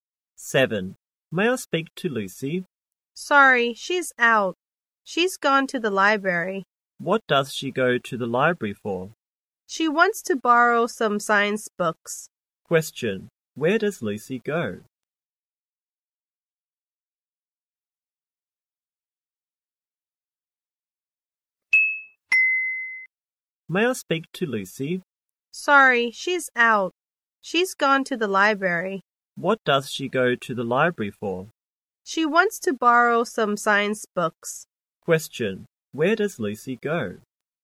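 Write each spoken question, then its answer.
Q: Where does Lucy go?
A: To the library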